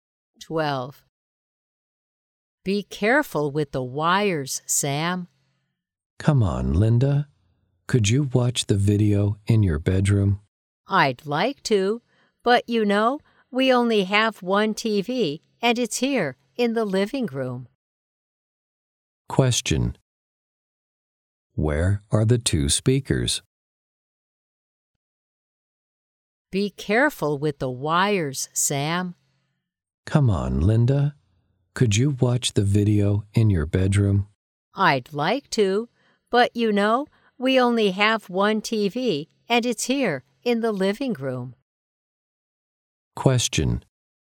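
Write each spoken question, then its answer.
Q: Where are the two speakers?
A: In the living room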